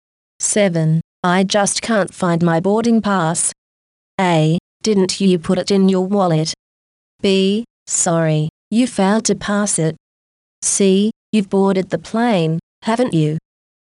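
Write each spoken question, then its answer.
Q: I just can't find my boarding pass.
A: A: Didn't you put it in your wallet?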